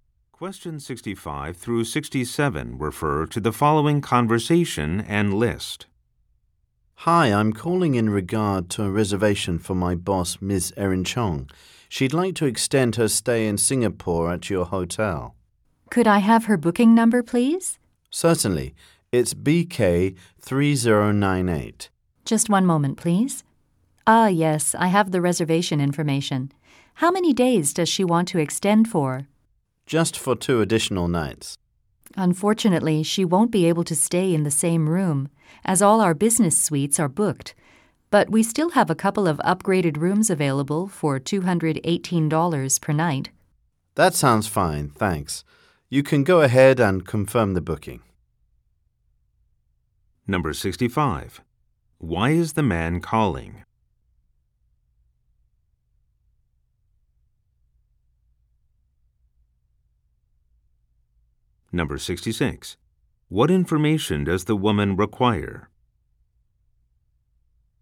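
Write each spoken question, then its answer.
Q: Why is the man calling?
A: To extend his boss's hotel reservation

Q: What information does the woman require?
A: The booking number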